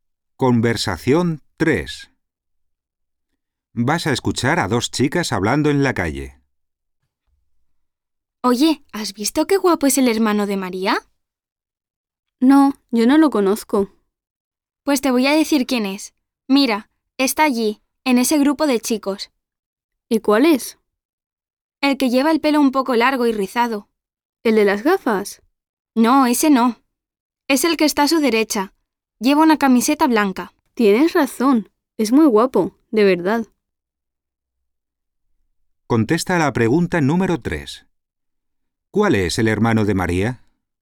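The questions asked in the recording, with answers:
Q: ¿Cuál es el hermano de María?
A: El chico del pelo un poco largo y rizado, con camiseta blanca, a la derecha del de las gafas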